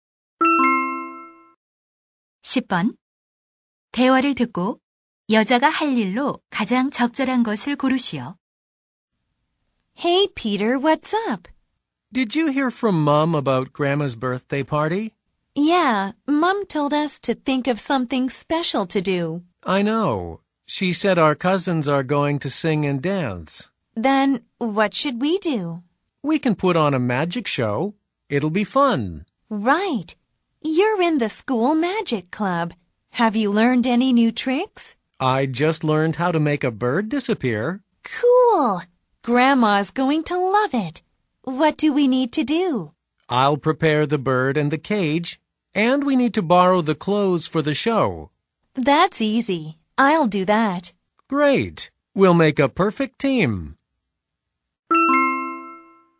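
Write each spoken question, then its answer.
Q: 대화를 듣고 여자가 할 일로 가장 적절한 것을 고르시오.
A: 공연용 의상 빌리기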